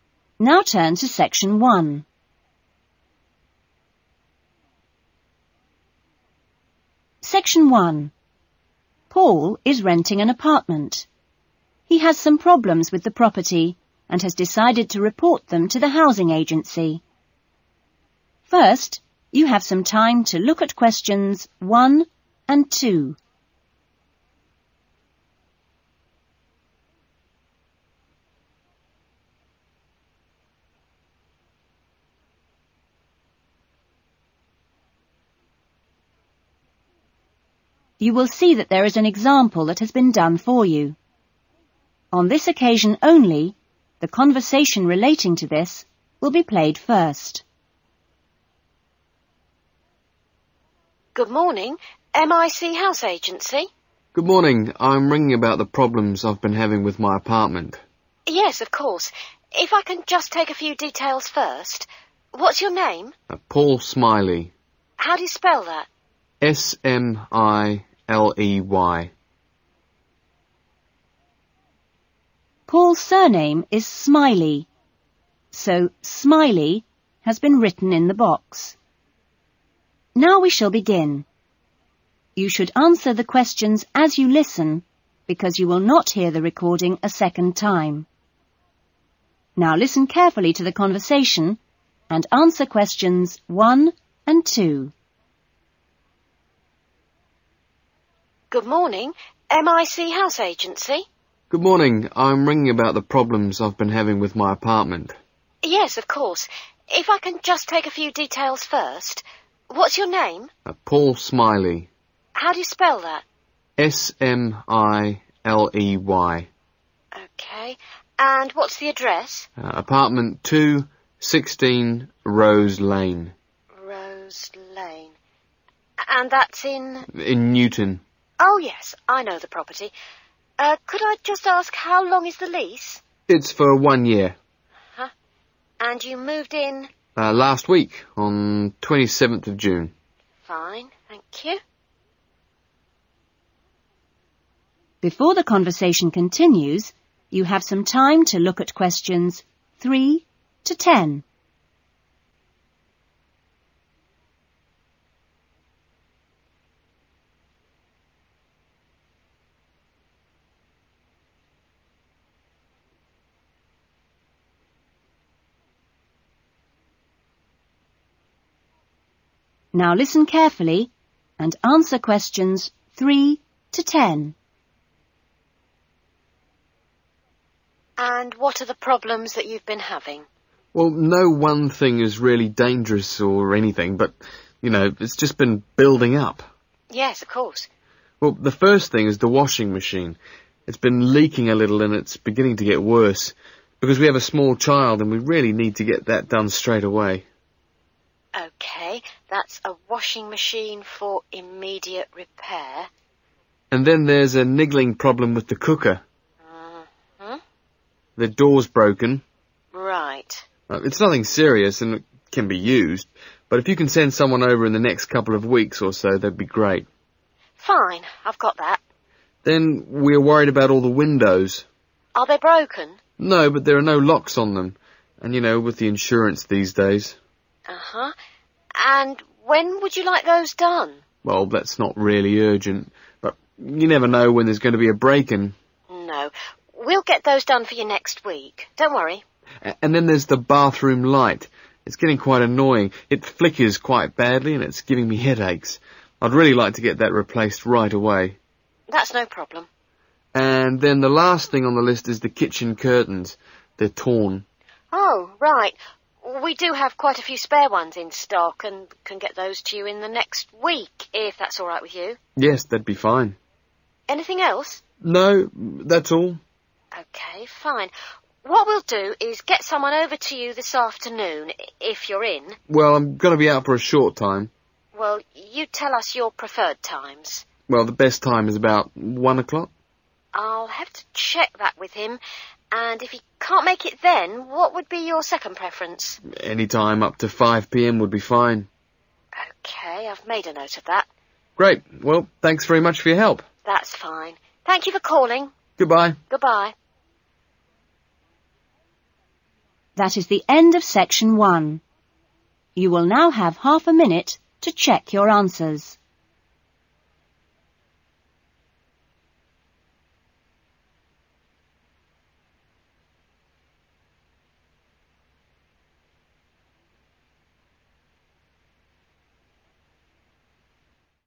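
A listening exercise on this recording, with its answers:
Complete the notes below. Write NO MORE THAN THREE WORDS for each answer.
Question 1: Address: Apartment 2, (1) ..............................................., Newton.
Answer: 16 Rose Lane

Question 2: Date moved in: (2) ................................................................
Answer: 27th of June

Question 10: Workman to call between (10)............................. and .................................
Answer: 1 o'clock and 5 p.m.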